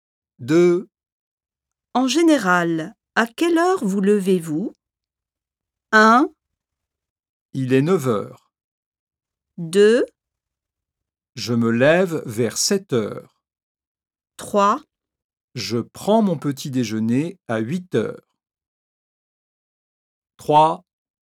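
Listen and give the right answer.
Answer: 2: Je me lève vers 7h.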